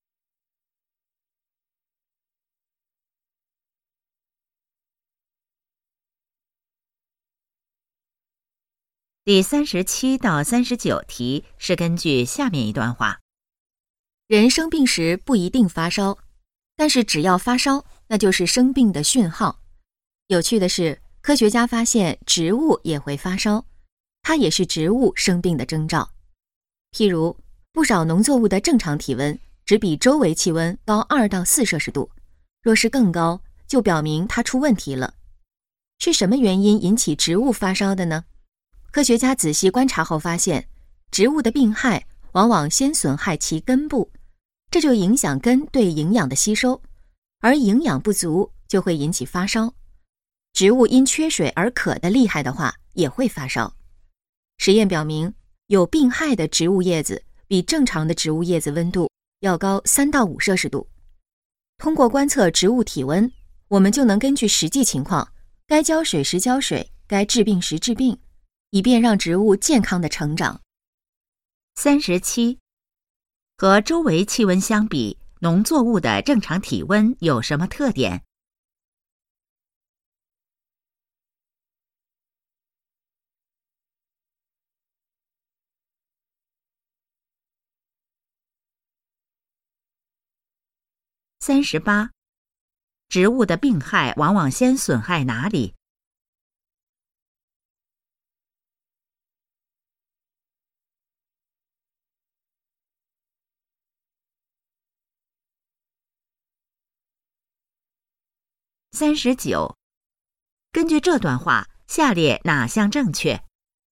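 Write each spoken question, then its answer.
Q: 和周围气温相比,农作物的正常体温有什么特点?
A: 高2-4摄氏度

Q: 植物的病害往往先损害哪里?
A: 根部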